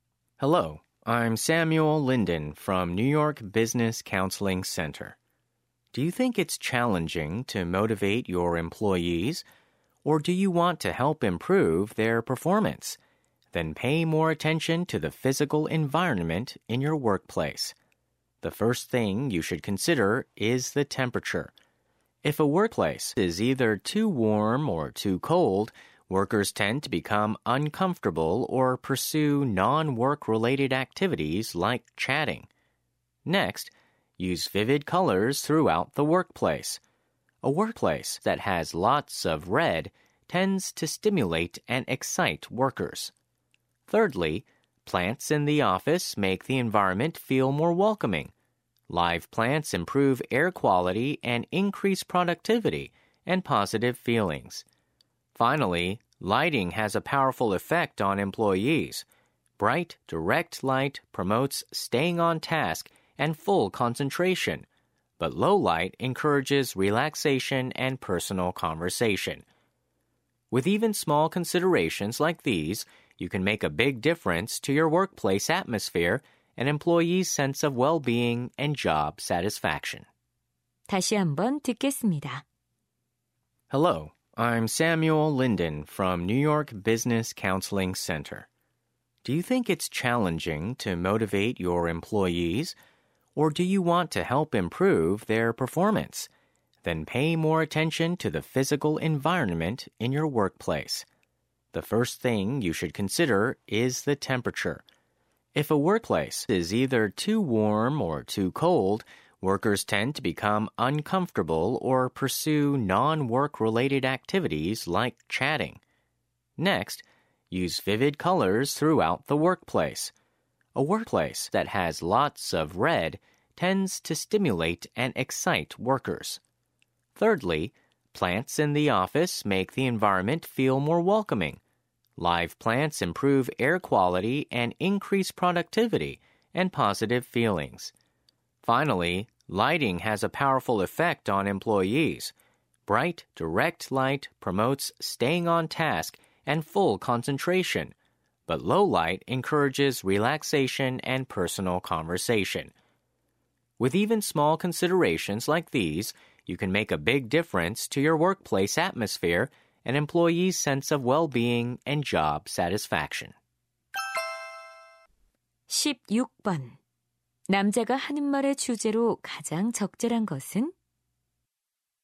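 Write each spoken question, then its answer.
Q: 남자가 하는 말의 주제로 가장 적절한 것은?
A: 직장의 물리적 환경이 직원의 동기와 성과에 미치는 영향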